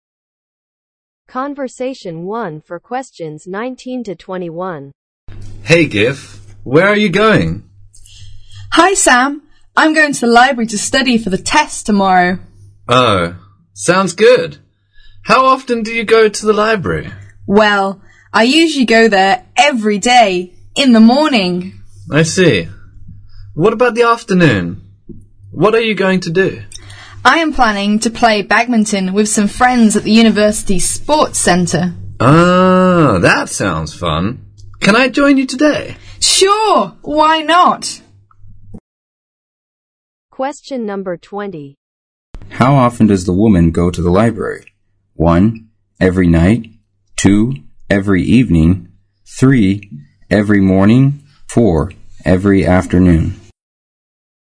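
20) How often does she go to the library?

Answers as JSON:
{"20": "Every morning"}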